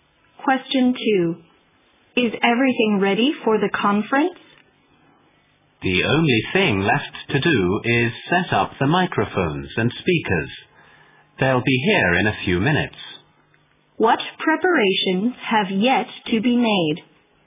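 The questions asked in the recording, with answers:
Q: What preparations have yet to be made?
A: Setting up the microphones and speakers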